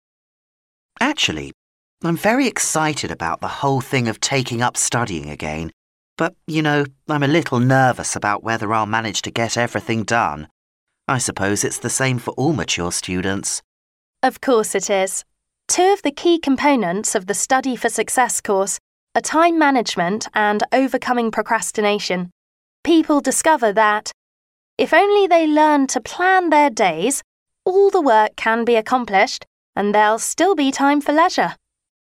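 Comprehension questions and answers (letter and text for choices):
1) Which of the following is a key component of the course?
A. Learning how to be confident.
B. Learning how to select appropriate materials.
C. Learning how to stay healthy.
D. Learning how to use time effectively.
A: D. Learning how to use time effectively.

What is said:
M: Actually, I'm very excited about the whole thing of taking up studying again, but, you know, I'm a little nervous about whether I'll manage to get everything done. I suppose it's the same for all mature students.
W: Of course it is. Two of the key components of the Study for Success course are time management and overcoming procrastination. People discover that, if only they learn to plan their days, all the work can be accomplished and there'll still be time for leisure.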